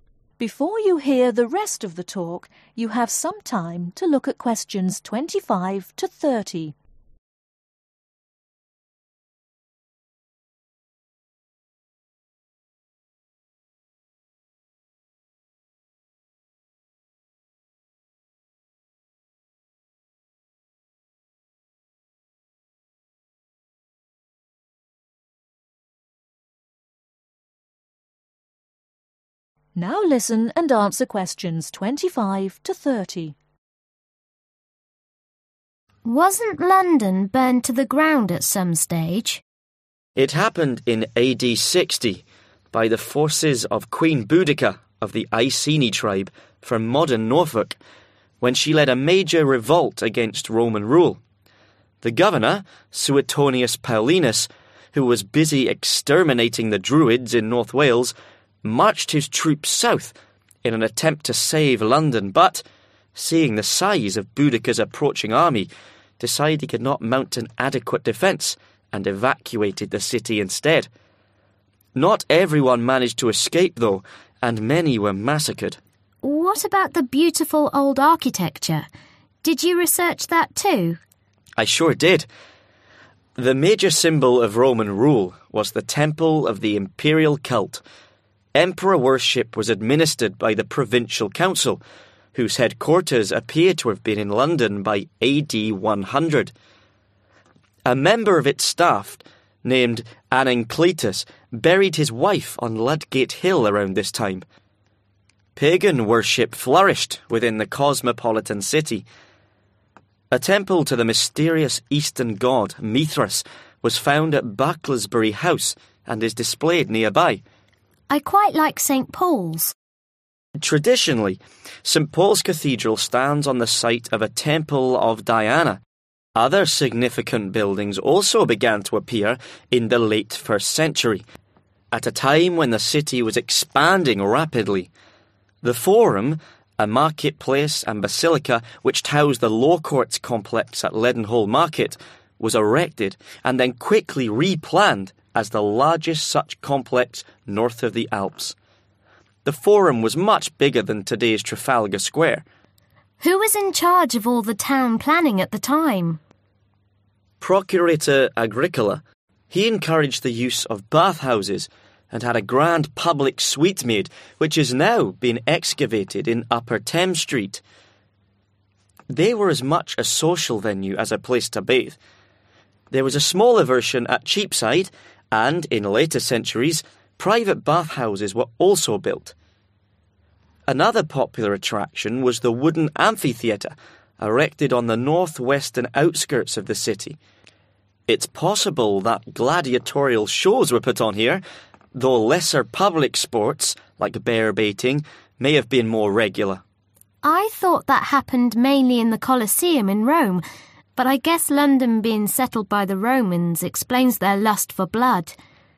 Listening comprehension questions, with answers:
Complete the notes below. Write NO MORE THAN TWO WORDS for each answer.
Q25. Queen Boudicca came from a part of England we now call (25)............ .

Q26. The governor, Suetonius Paulinus, couldn't save London from the forces of the Iceni Tribe, and so (26)............ the city.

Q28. The forum was much bigger than (28)............ is today.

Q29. Bath houses were a (29)............ as much as they were a place to bath.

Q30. (30)............ was a regular sport in London's amphitheaters.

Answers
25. Norfolk
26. Evacuated
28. Trafalgar Square
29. Social Venue
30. Bear-Baiting